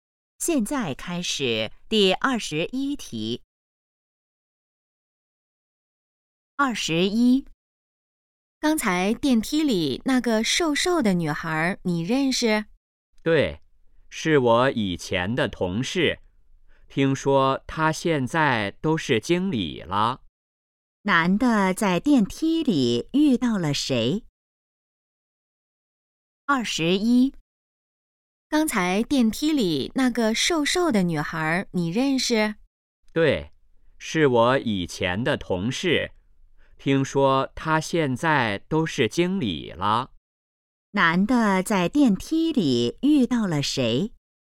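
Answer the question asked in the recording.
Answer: 以前的同事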